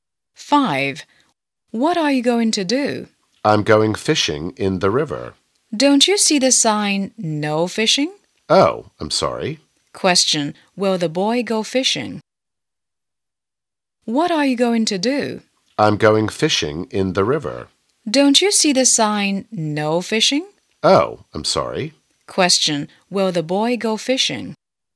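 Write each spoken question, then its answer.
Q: Will the boy go fishing?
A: No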